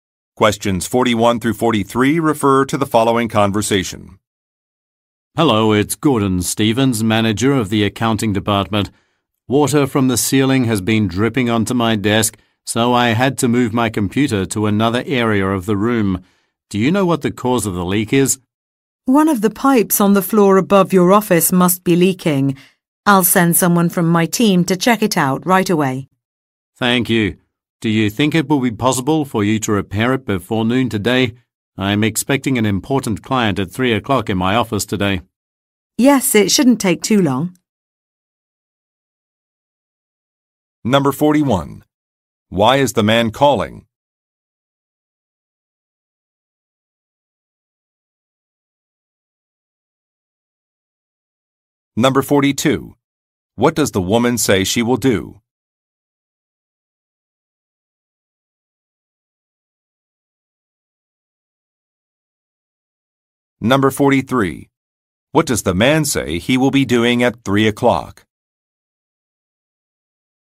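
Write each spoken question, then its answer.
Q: Why is the man calling?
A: To report water leaking from the ceiling onto his desk

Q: What does the woman say she will do?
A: Send someone from her team to check the leak

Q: What does the man say he will be doing at 3 o'clock?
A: Meeting an important client in his office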